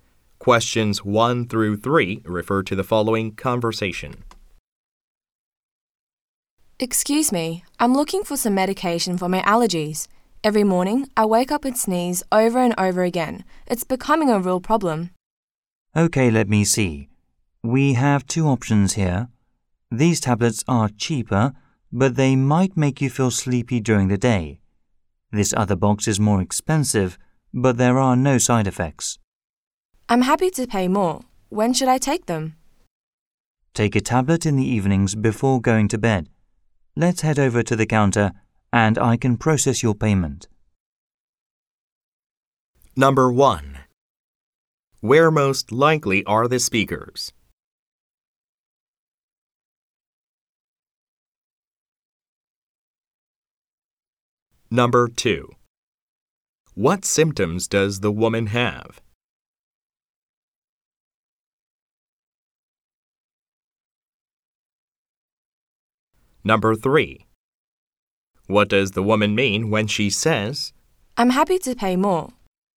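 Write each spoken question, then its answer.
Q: Where most likely are the speakers?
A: At a pharmacy

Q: What symptoms does the woman have?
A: She sneezes over and over every morning (allergies)

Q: What does the woman mean when she says,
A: She wants the more expensive medication with no side effects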